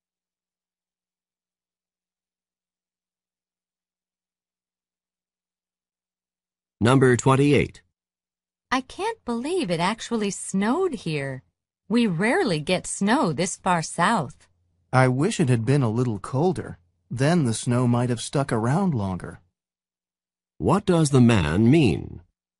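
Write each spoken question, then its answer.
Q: What does the man mean?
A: The snow melted too quickly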